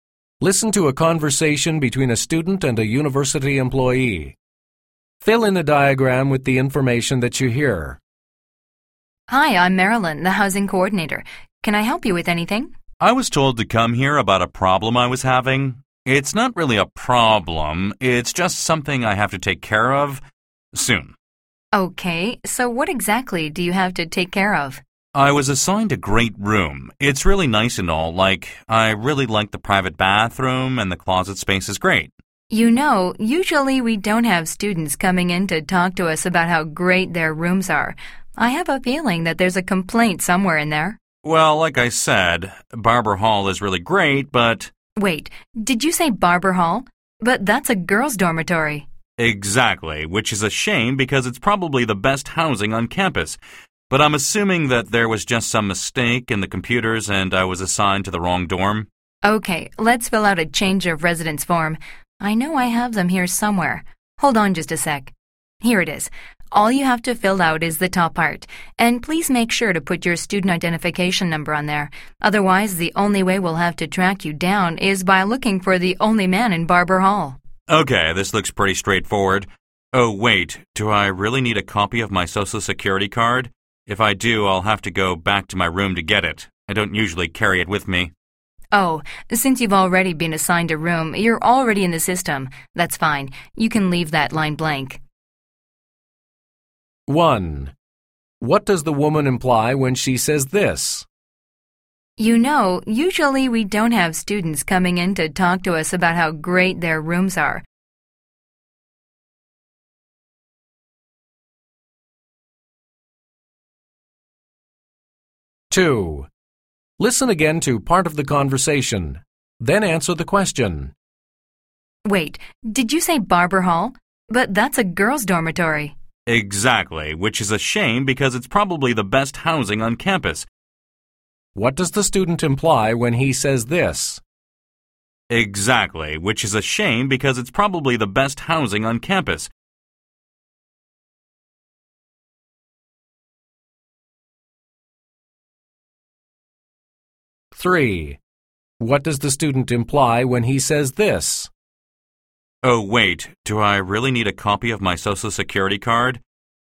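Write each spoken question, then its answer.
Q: What does the woman imply when she says this?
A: She thinks the student has come to complain about something.

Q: What does the student imply when he says this?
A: He likes the dorm, but he can't stay because it's a girls' dormitory.

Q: What does the student imply when he says this?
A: He doesn't have the card with him and would have to go back to his room to get it.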